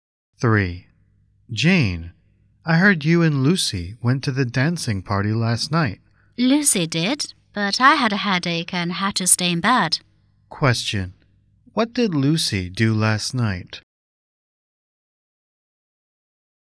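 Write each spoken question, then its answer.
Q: What did Lucy do last night?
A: She went to the dancing party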